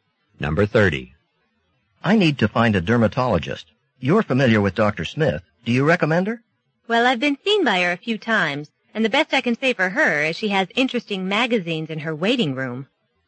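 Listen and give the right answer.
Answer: She doesn't recommend Dr. Smith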